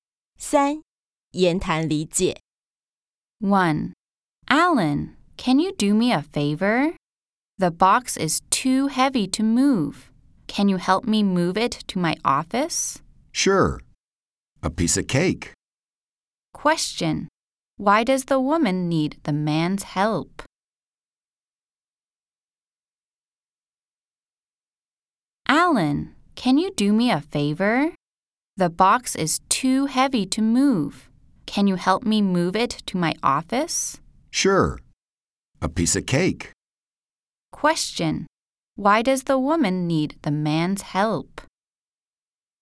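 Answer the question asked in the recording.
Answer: The box is too heavy for her to move to her office.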